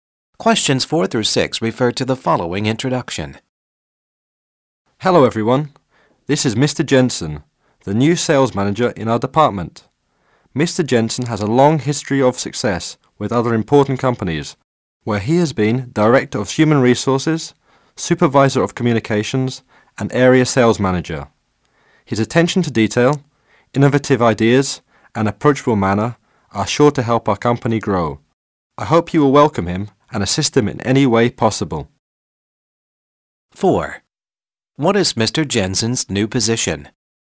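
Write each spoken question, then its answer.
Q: What is Mr. Jensen's new position?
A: Sales manager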